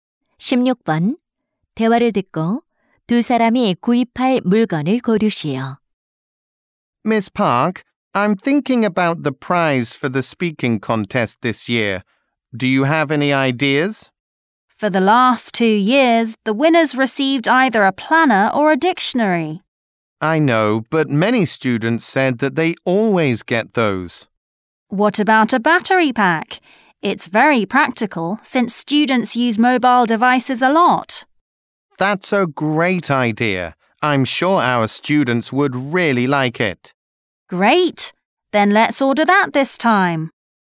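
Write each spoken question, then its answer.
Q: 대화를 듣고 두 사람이 구입할 물건을 고르시오.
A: 보조 배터리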